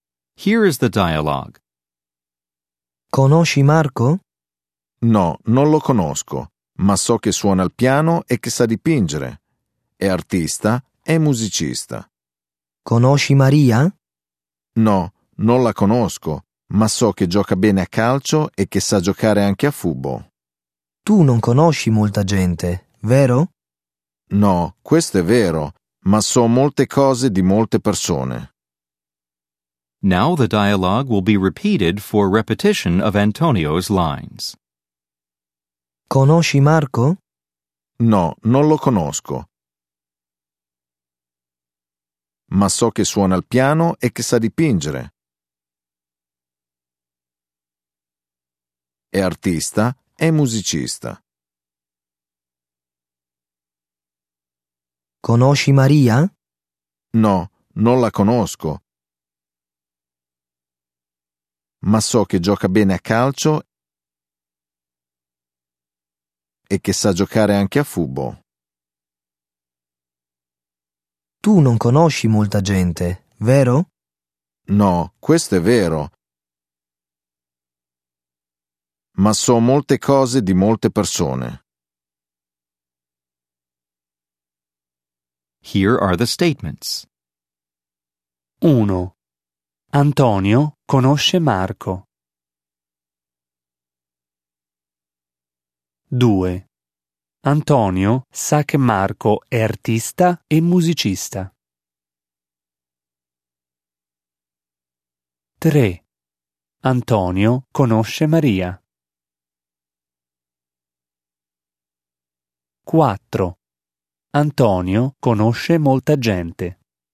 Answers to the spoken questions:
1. 1. Falso.
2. 2. Vero.
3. 3. Falso.
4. 4. Falso.